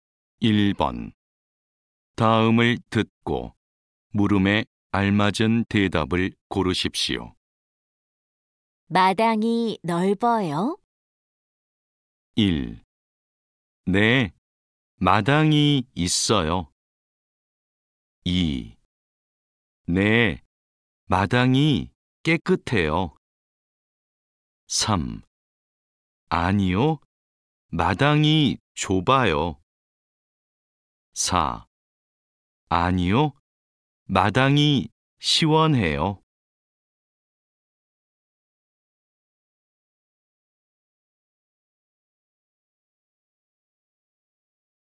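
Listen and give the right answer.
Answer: 3: 아니요, 마당이 좁아요.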